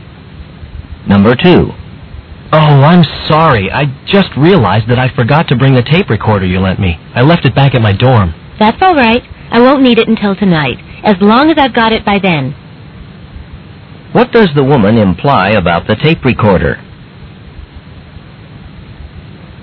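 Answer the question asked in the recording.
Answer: The man can return it later, as long as she has it by tonight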